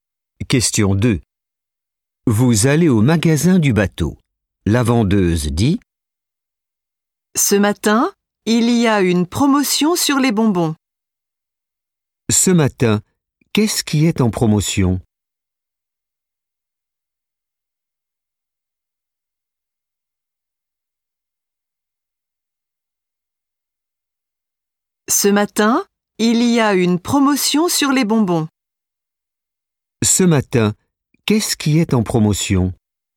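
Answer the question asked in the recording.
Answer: Les bonbons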